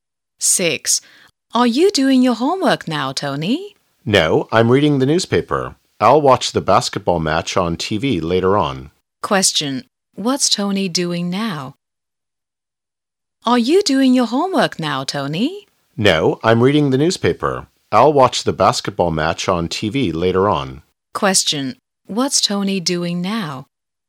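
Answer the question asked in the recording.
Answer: Reading the newspaper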